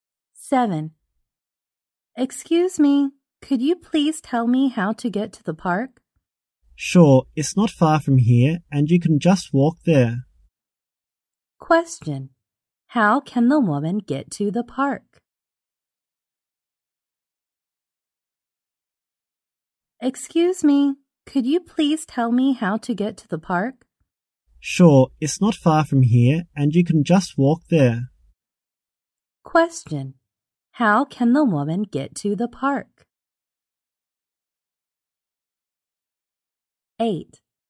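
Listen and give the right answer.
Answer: On foot (she can walk there)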